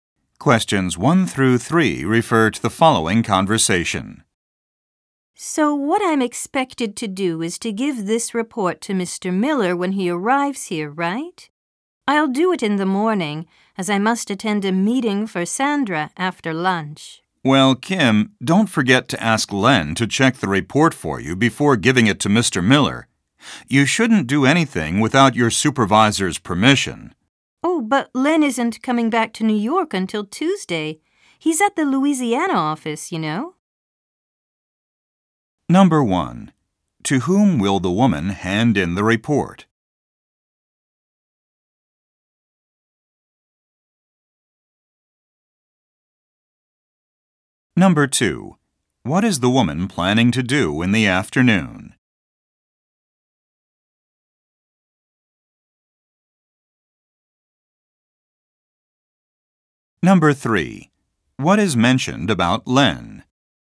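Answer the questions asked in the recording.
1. Mr. Miller
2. Attend a meeting for Sandra
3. He is at the Louisiana office and won't be back in New York until Tuesday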